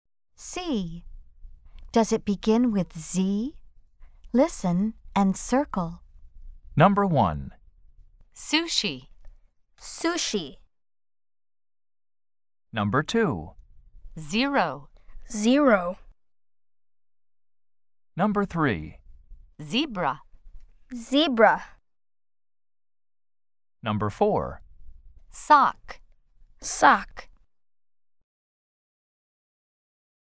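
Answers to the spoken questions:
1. No (sushi)
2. Yes (zero)
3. Yes (zebra)
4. No (sock)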